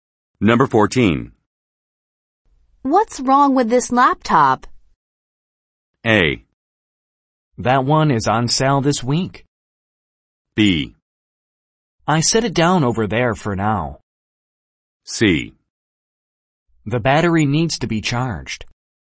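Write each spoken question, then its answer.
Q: What's wrong with this laptop?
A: C: The battery needs to be charged.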